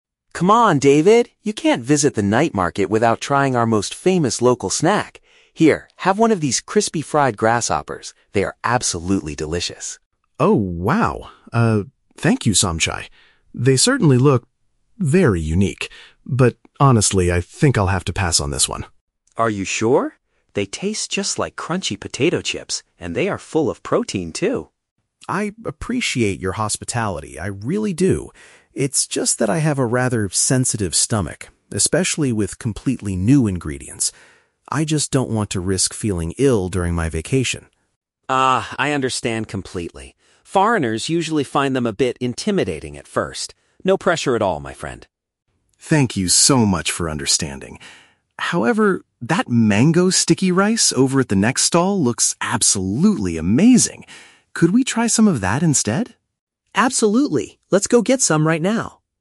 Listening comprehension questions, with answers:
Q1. Why does the tourist refuse to eat the special snack?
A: He is afraid his digestive system might react badly to the unfamiliar food.

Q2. How does the local host react to the tourist's decision?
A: He accepts the refusal because visitors often feel nervous about the dish.

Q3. What will the two men most likely do next?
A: Purchase a different, sweeter type of local street food.

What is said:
Somchai: Come on, David! You can't visit the night market without trying our most famous local snack. Here, have one of these crispy fried grasshoppers. They are absolutely delicious!
David: Oh, wow. They certainly look... very unique. But honestly, I think I'll have to pass on this one.
Somchai: Are you sure? They taste just like crunchy potato chips! And they are full of protein, too.
David: I appreciate your hospitality, I really do. It's just that I have a rather sensitive stomach, especially with completely new ingredients. I just don't want to risk feeling ill during my vacation.
Somchai: Ah, I understand completely. Foreigners usually find them a bit intimidating at first. No pressure at all, my friend.
David: Thank you so much for understanding! However, that mango sticky rice over at the next stall looks absolutely amazing. Could we try some of that instead?
Somchai: Absolutely! Let's go get some right now.